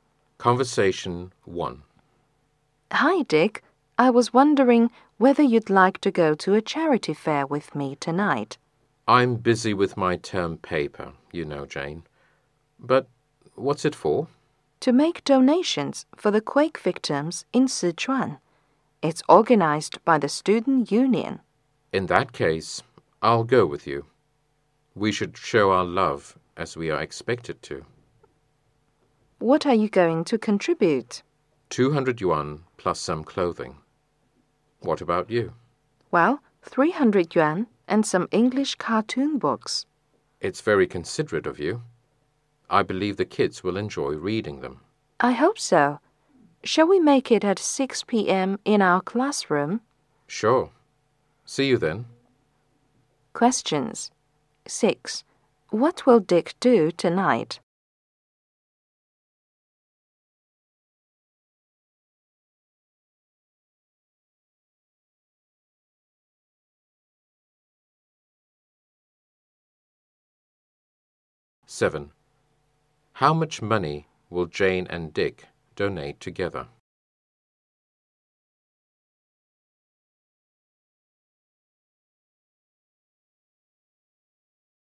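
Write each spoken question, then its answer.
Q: What will Dick do tonight?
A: Go to a charity fair with Jane

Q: How much money will Jane and Dick donate together?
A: 500 yuan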